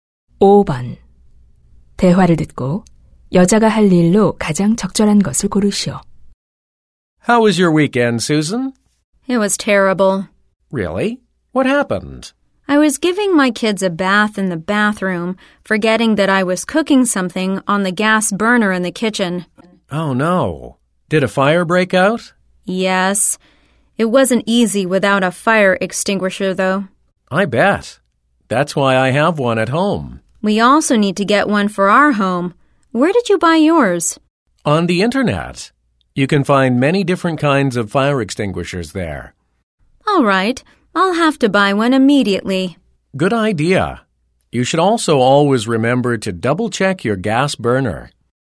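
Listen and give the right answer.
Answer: 소화기 구입하기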